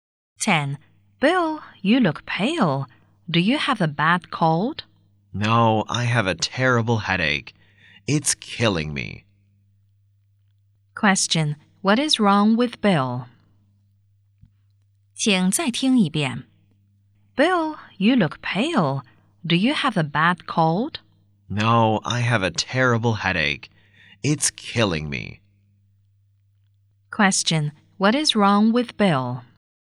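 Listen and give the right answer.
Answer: He has a terrible headache.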